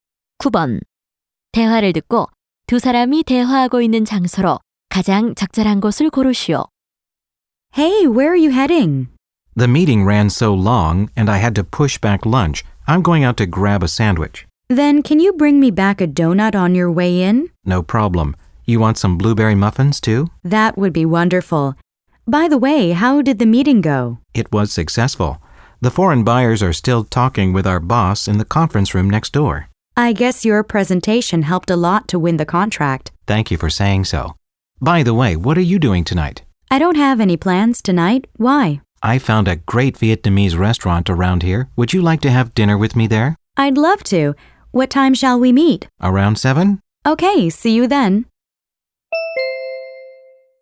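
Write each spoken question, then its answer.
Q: 대화를 듣고 두 사람이 대화하고 있는 장소로 가장 적절한 곳을 고르시오.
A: 사무실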